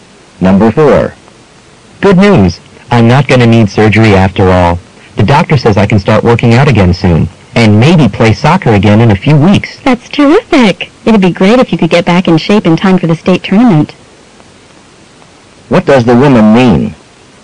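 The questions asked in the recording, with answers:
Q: What does the woman mean?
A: She hopes he'll be fit for the state tournament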